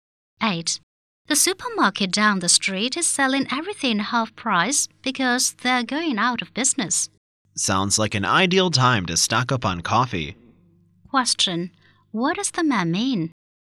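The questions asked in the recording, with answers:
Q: What does the man mean?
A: It's a good time to buy plenty of coffee.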